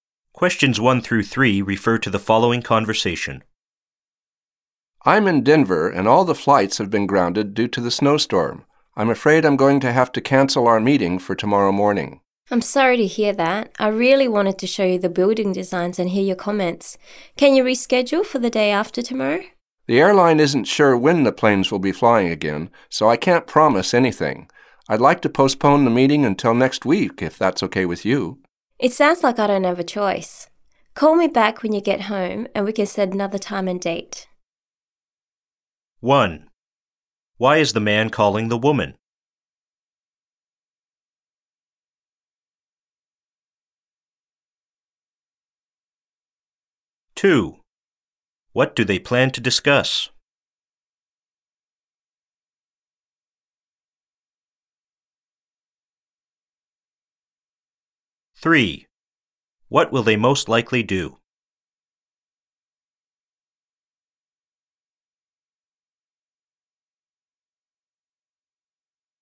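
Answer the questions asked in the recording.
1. To cancel their meeting because his flight was grounded by a snowstorm
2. Building designs
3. Reschedule the meeting for next week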